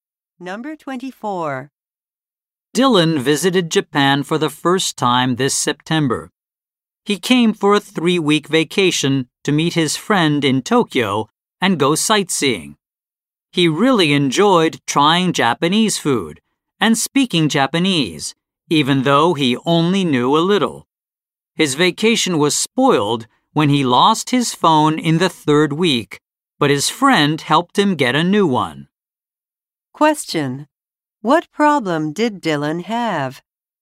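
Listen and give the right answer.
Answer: He lost his phone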